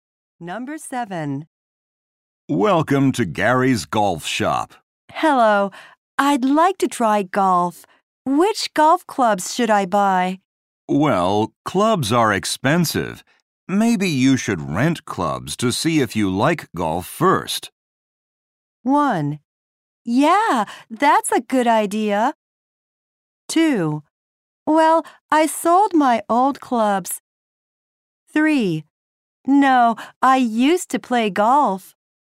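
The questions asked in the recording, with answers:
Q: Maybe you should rent clubs to see if you like golf first.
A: 1: Yeah, that's a good idea.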